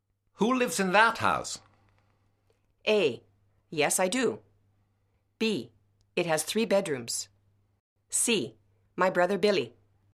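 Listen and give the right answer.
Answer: C: My brother Billy.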